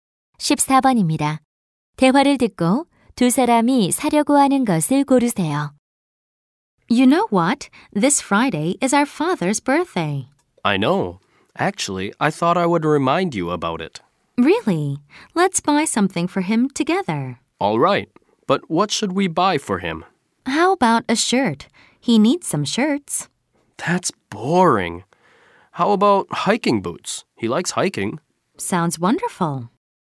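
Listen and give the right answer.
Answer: 등산화 (hiking boots)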